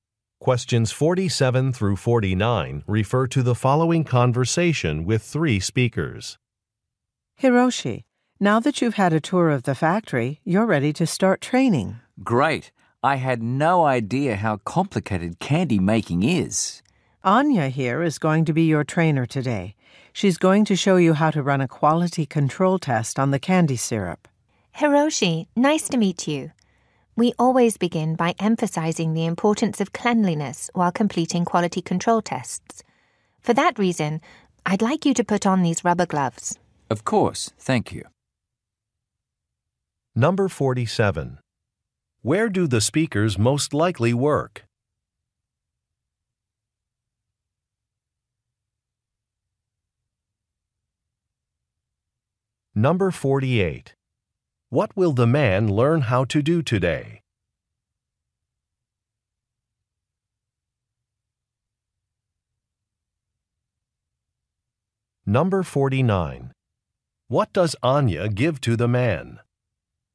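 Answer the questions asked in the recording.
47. At a candy factory.
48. Run a quality control test.
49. Rubber gloves.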